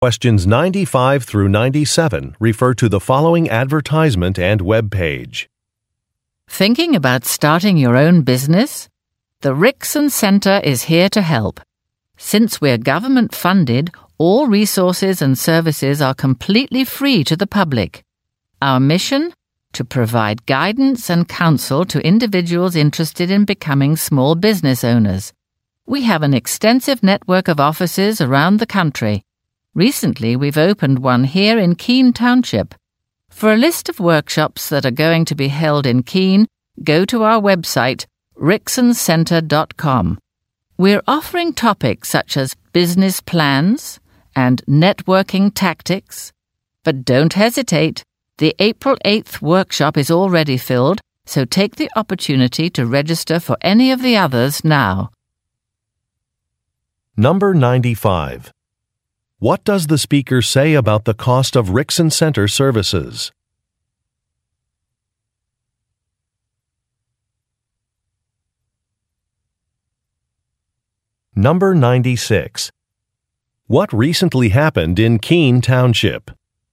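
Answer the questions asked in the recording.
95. They are free to the public.
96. A Rickson Center office opened there.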